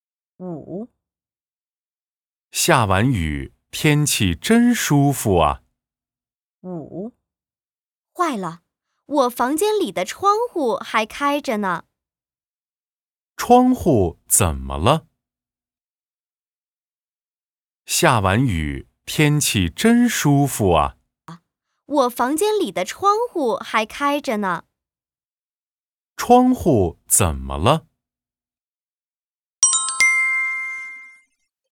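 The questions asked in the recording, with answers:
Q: 窗户怎么了?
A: 还开着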